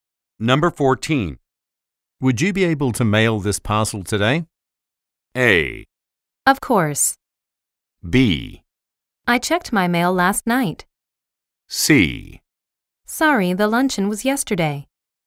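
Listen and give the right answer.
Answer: A: Of course.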